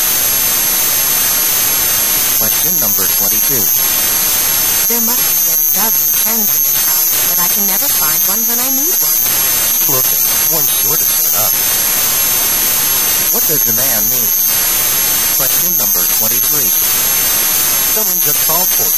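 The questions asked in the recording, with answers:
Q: What does the man mean?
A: A pen will turn up if she keeps looking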